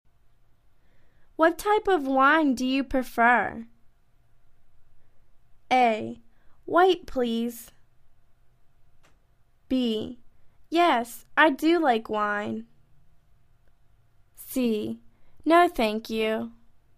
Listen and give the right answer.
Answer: White, please.